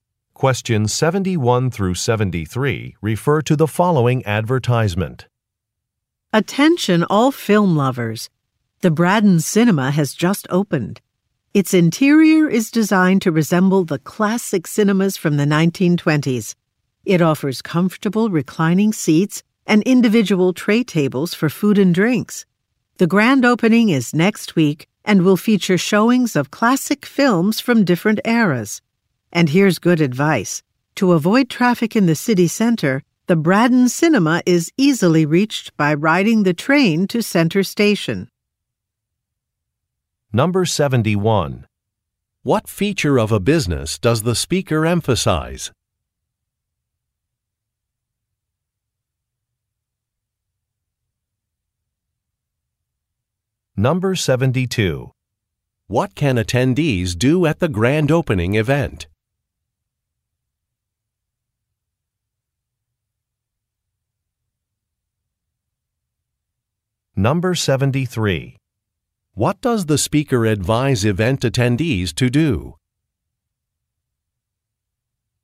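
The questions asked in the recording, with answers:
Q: What can attendees do at the grand opening event?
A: Watch classic films from different eras

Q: What does the speaker advise event attendees to do?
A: Take the train to Center Station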